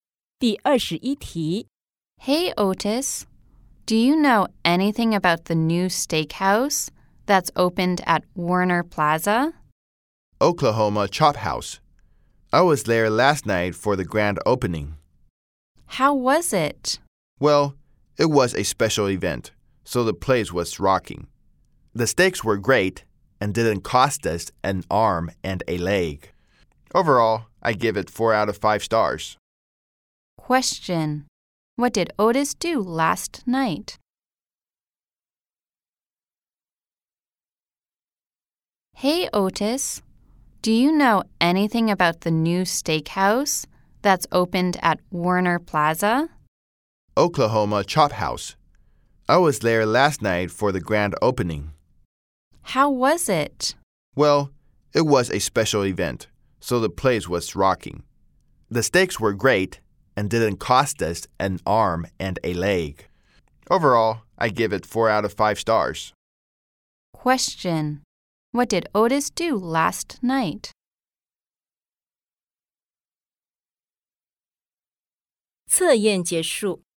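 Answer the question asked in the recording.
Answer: He went to the grand opening of the new steakhouse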